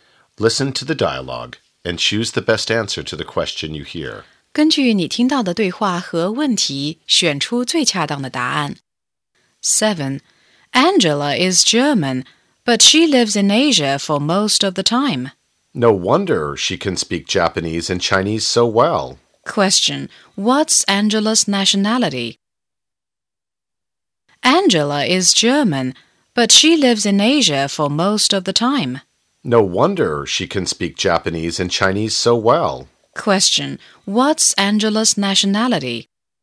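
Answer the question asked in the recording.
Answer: German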